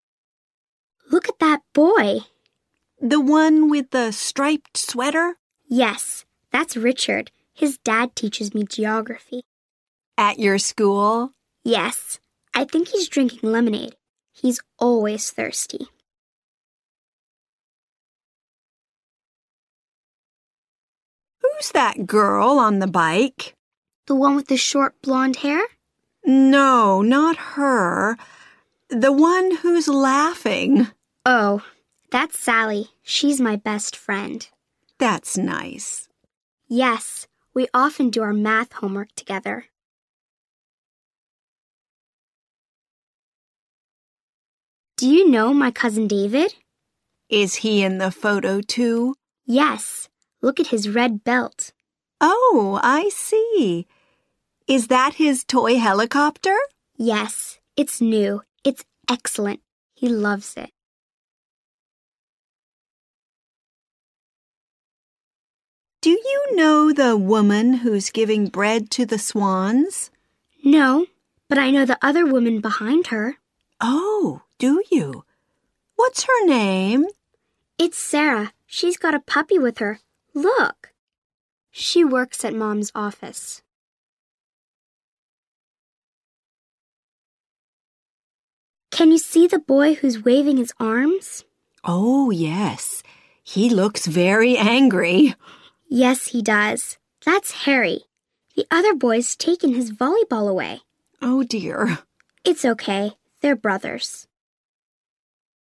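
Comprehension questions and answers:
( listen and choose the right answer )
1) Who is Richard ?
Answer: the boy in the striped sweater drinking lemonade

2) Who is Sally ?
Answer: the laughing girl on the bike

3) Who is David ?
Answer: the boy with the red belt and a toy helicopter

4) Who is Sarah ?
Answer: the woman with a puppy, behind the woman feeding the swans

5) Who is Harry ?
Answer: the angry boy waving his arms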